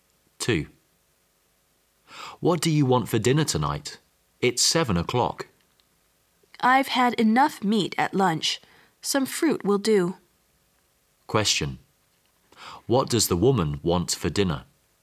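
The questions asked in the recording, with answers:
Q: What does the woman want for dinner?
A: Some fruit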